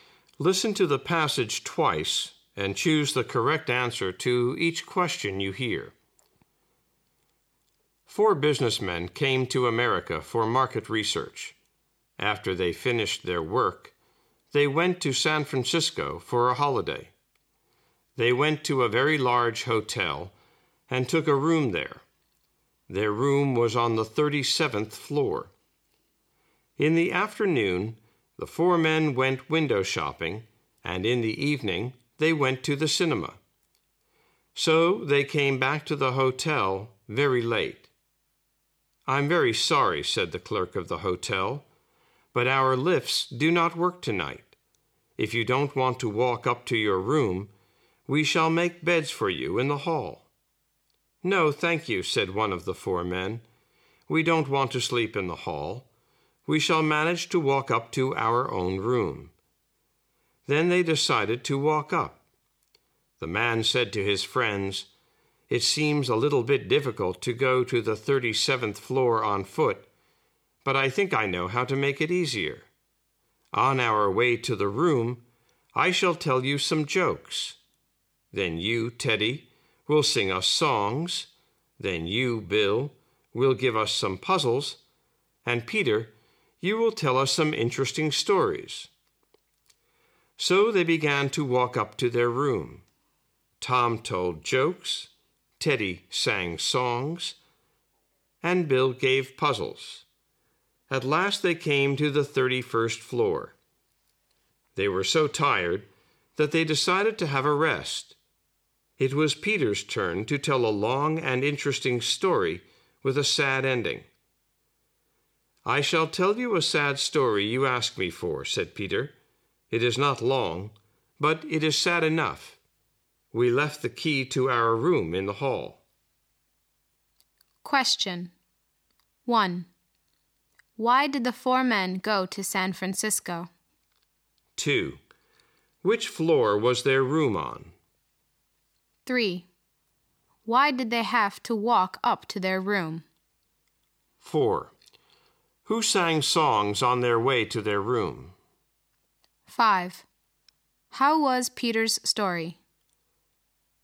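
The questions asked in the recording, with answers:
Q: Why did the four men go to San Francisco?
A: For a holiday

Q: Which floor was their room on?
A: The 37th floor

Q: Why did they have to walk up to their room?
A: Because the lifts did not work that night

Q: Who sang songs on their way to their room?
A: Teddy

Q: How was Peter's story?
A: Short but sad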